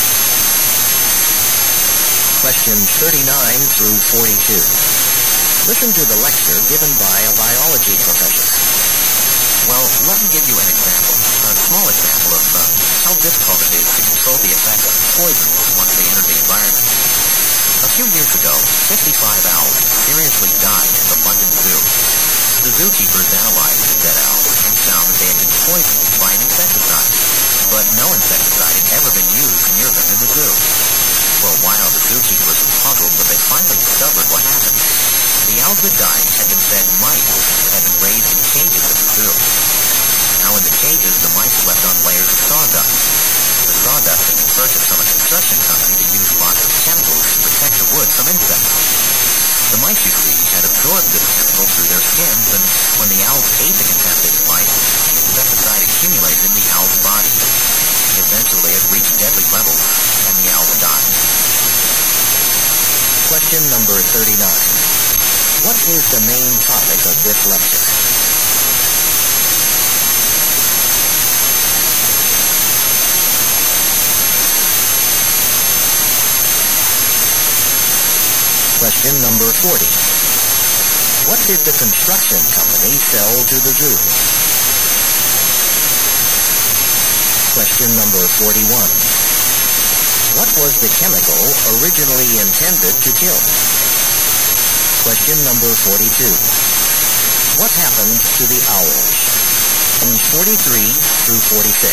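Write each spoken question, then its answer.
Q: What is the main topic of this lecture?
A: How hard it is to control poisons in the environment

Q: What did the construction company sell to the zoo?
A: Sawdust

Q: What was the chemical originally intended to kill?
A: Insects

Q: What happened to the owls?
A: They died from eating poisoned mice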